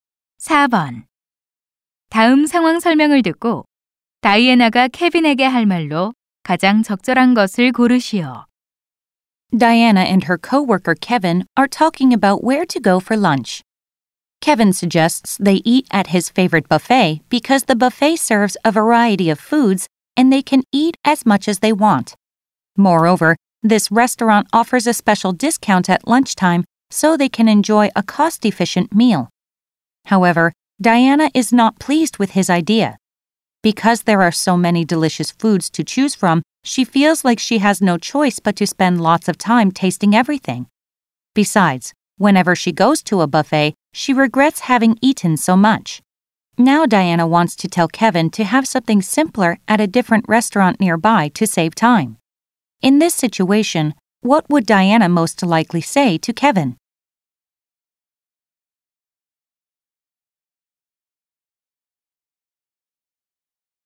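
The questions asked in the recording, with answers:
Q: In this situation, what would Diana most likely say to Kevin?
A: Let's have something simple at a restaurant nearby instead to save time.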